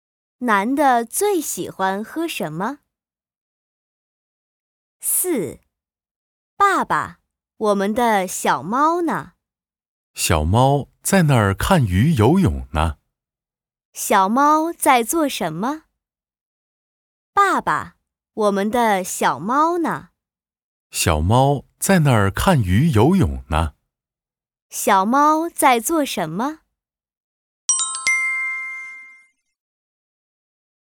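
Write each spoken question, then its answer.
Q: 小猫在做什么?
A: 看鱼游泳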